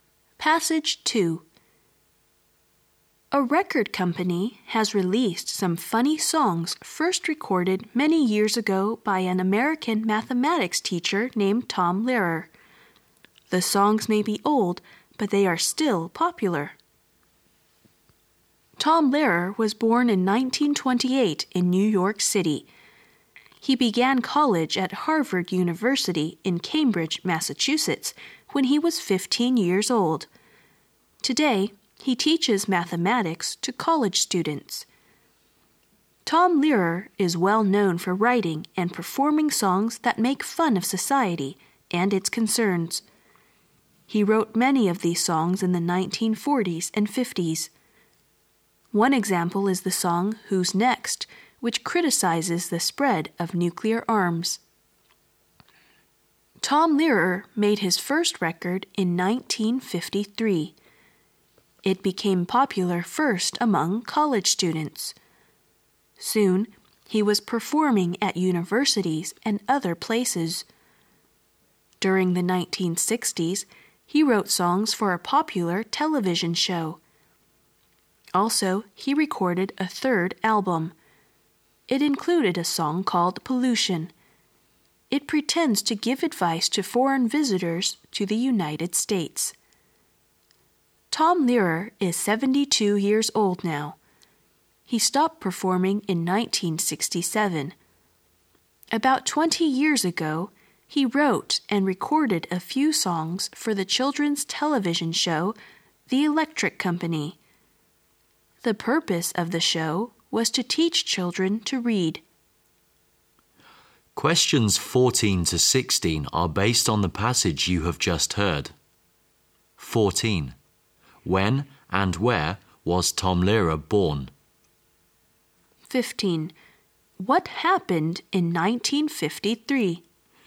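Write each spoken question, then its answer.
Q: When and where was Tom Lehrer born?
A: In 1928 in New York City

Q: What happened in 1953?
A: Tom Lehrer made his first record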